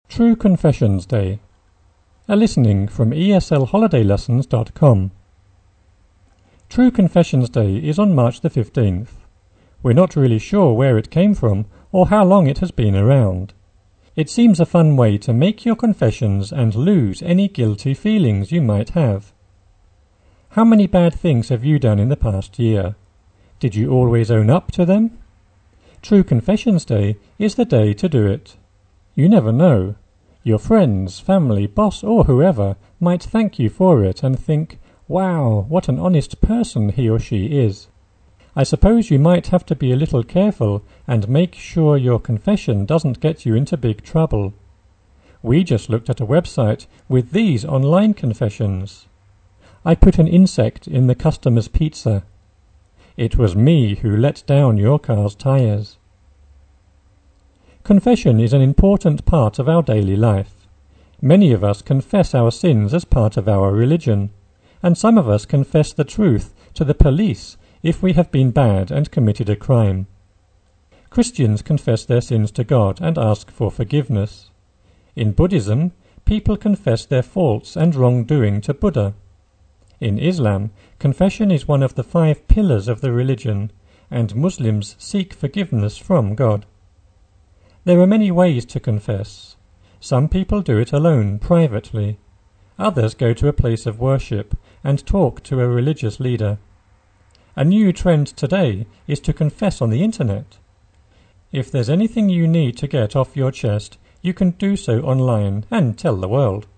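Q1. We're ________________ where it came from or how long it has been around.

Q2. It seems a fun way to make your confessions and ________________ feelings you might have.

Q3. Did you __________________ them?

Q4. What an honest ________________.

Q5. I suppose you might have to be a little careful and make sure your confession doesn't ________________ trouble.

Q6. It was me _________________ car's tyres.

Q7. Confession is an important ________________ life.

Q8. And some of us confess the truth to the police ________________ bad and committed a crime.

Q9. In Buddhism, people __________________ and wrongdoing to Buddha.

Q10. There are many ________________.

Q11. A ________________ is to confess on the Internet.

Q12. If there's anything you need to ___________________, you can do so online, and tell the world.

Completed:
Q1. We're not really sure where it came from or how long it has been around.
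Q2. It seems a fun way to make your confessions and lose any guilty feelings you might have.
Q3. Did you always own up to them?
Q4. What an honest person he or she is.
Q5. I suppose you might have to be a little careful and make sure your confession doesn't get you into big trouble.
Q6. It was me who let down your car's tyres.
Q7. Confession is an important part of our daily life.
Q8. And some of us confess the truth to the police if we have been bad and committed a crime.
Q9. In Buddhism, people confess their faults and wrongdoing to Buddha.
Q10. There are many ways to confess.
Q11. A new trend today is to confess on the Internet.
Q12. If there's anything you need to get off your chest, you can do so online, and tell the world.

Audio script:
True Confessions Day is on March 15th. We're not really sure where it came from or how long it has been around.
We're not really shore / sure where it came from or how long it has been round / around. 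It seems a fun way to make your confessions and lose / lost any guilty feelings you might have. How many bad things have you done in the past year? Did you always down / own up to them? True Confessions Day is the day to do it. You never know, your friends, family, boss, or whoever might thank / think you for it and think "Wow! What an honest person he or she is." I suppose you might have to be a little careful and make sure your confession doesn't have / get you into big trouble. We just looked at a website with these / this online confessions: "I put an insect in the customer's pizza." "It was me who let up / down your car's tyres."
Confession is an important part of our daily / day life. Many of us confess our sins as part of our religion. And sum / some of us confess the truth to the police if we have been bad and committed a criminal / crime. Christians confess their sins to God and ask for forgiveness. 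In Buddhism, people confess their faults / forts and wrongdoing to Buddha. In Islam, confession is one of / at the five pillars of the religion and Muslims seek forgiveness from God. There are many ways to confess. Some people do it alone / lonely, privately. Others go to a place of worship and talk to a religious leader. A new trendy / trend today is to confess on the Internet. If there's anything you need to get off your chest / lungs, you can do so online, and tell the world.
you can do so lionne
your chest, you can do so online, and tell the world.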